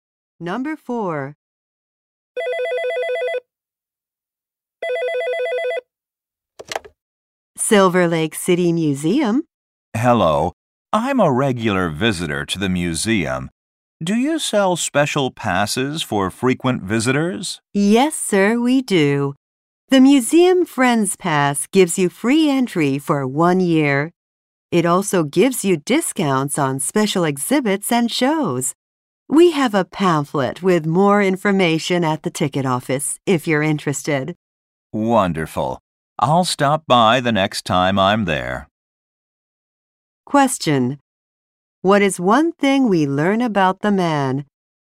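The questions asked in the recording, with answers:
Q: What is one thing we learn about the man?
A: He visits the museum regularly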